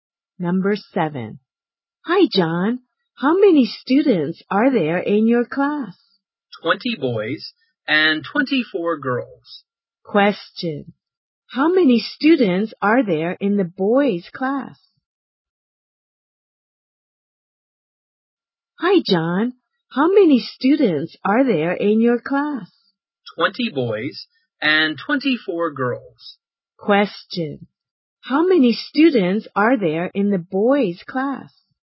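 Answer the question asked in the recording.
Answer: 44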